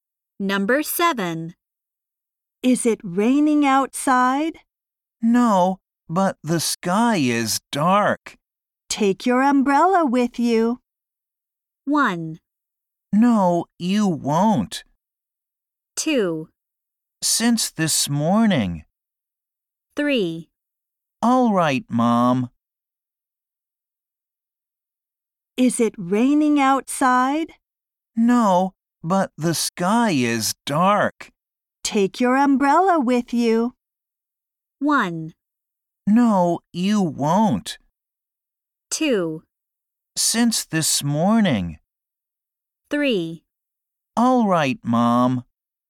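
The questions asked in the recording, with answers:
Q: Take your umbrella with you.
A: 3: All right, Mom.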